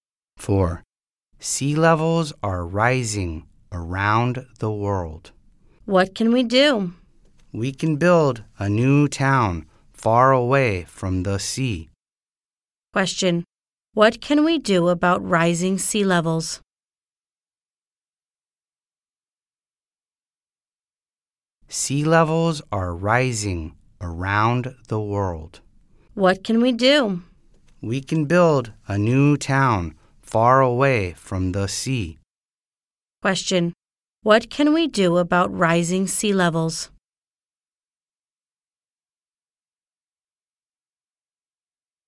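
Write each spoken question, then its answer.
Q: What can we do about rising sea levels?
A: Build a new town far away from the sea.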